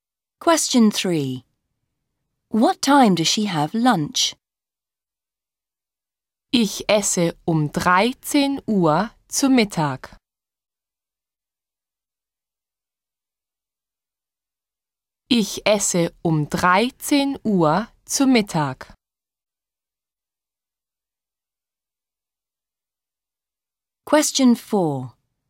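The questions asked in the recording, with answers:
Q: What time does she have lunch?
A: At 1 pm (13:00)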